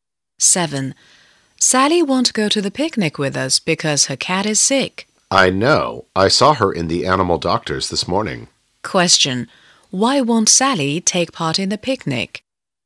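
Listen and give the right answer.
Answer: Her cat is sick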